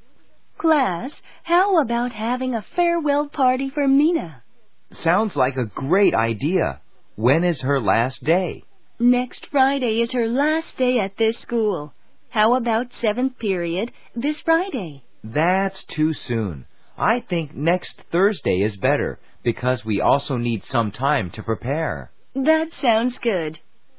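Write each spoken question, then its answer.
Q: 대화를 듣고 파티를 하기로 한 날을 고르세요.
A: 다음 주 목요일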